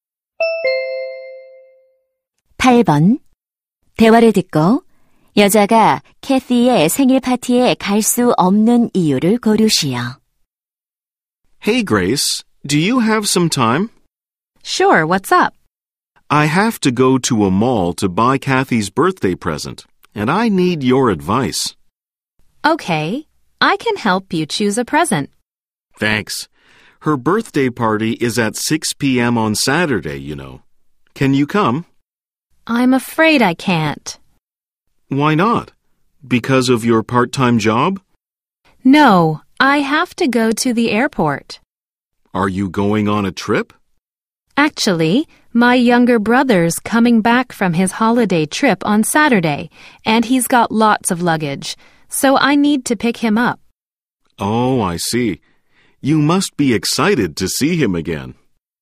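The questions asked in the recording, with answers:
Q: 대화를 듣고 여자가 캐티의 생일 파티에 갈 수 없는 이유를 고르시오.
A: 남동생을 데리러 공항에 가야 해서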